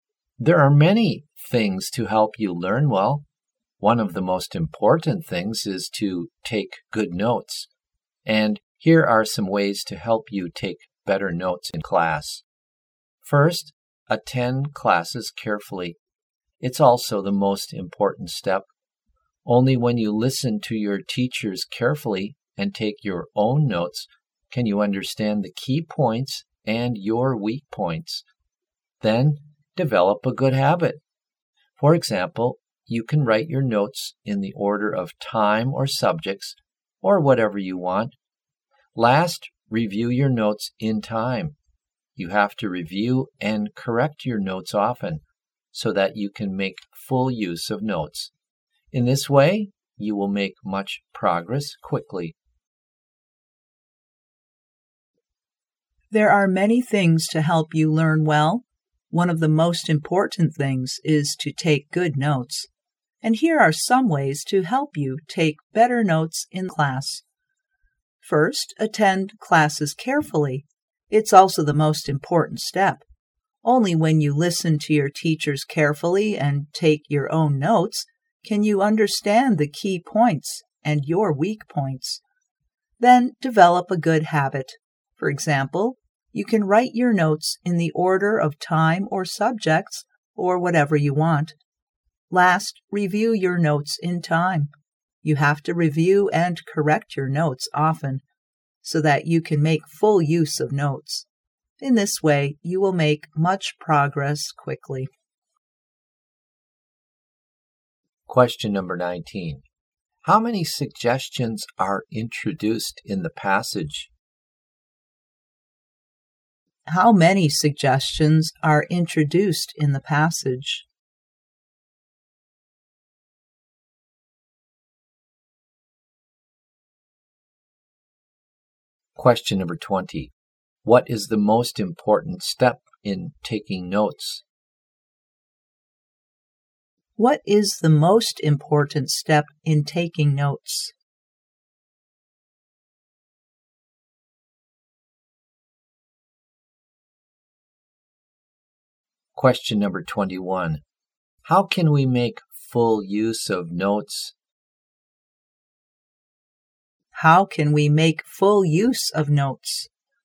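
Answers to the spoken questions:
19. Three
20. Attending classes carefully
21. By reviewing and correcting them often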